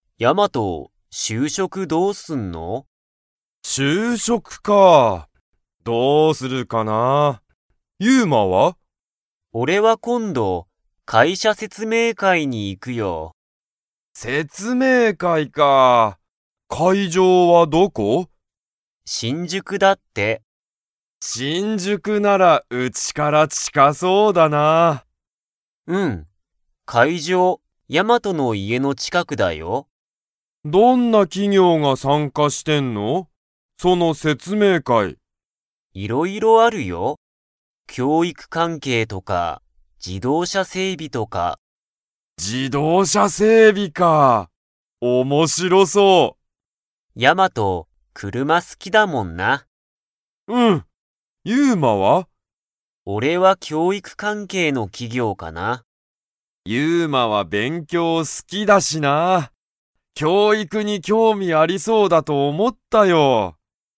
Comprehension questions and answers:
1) 説明会せつめいかいの会場かいじょうは、ヤマトの家いえから 。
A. 近ちかい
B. 近ちかくない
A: A. 近ちかい

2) ユウマは、何なにに興味きょうみがありますか?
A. 車くるま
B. 整備せいび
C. 教育きょういく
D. 歴史れきし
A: C. 教育きょういく

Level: Level 4

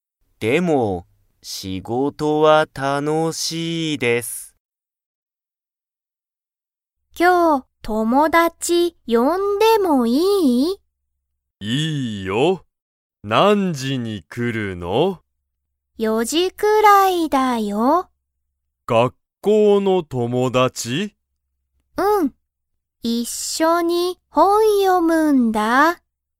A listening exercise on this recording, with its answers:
Comprehension Quiz (Skip if you don't understand the conversation yet)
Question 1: ももこは、学校がっこうの友達ともだちを呼よびますか?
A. はい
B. いいえ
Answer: A. はい

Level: Level 1

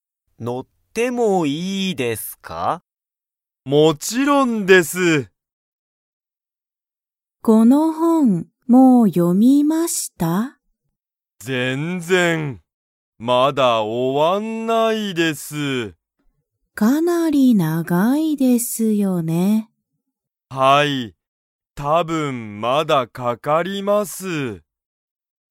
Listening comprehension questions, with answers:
その本(ほん)は長(なが)いですか?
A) はい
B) いいえ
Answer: A) はい

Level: Level 1

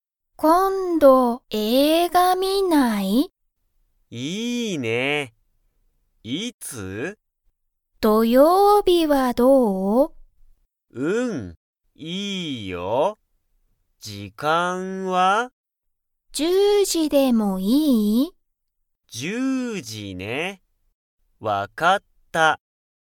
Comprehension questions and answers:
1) カナとトシは、今日映画(きょうえいが)を観(み)ますか?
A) はい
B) いいえ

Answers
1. B) いいえ

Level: Level 1

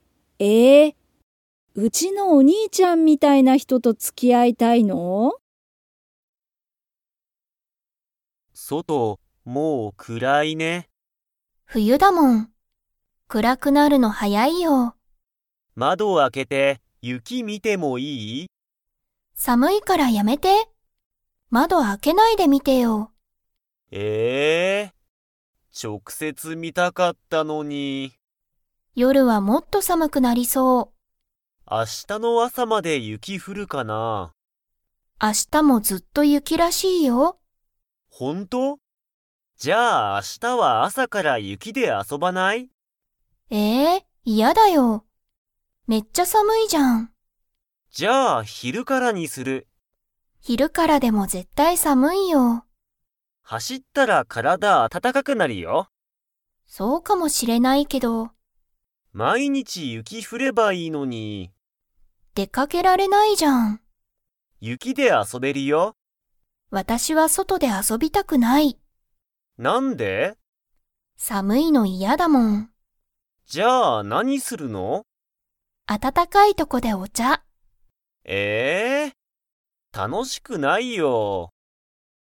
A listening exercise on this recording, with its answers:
Comprehension Quiz (Skip if you don't understand the conversation yet)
外そとは 。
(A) 暗くらい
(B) 暗くらくない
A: (A) 暗くらい

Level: Level 4

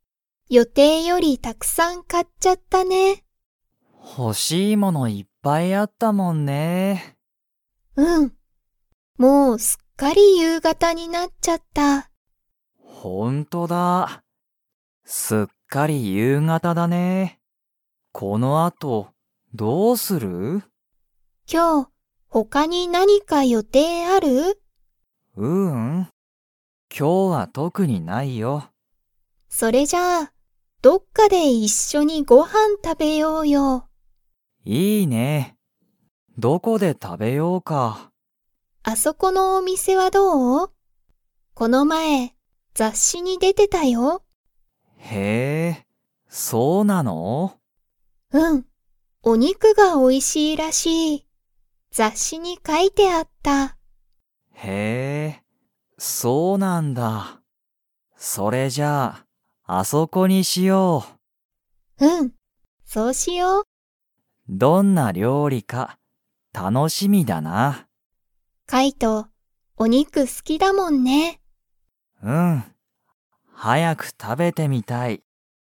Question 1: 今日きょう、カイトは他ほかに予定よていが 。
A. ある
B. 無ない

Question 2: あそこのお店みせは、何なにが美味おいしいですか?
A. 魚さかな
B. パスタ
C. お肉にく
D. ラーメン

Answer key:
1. B. 無ない
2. C. お肉にく

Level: Level 4

